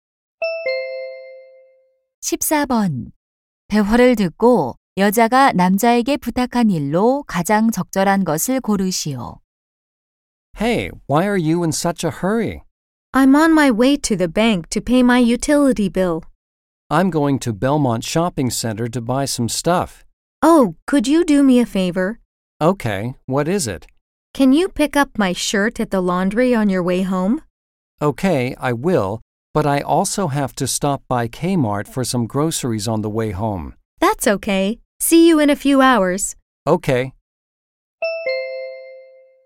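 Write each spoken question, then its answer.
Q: 대화를 듣고 여자가 남자에게 부탁한 일로 가장 적절한 것을 고르시오.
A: 세탁소에서 셔츠 찾아오기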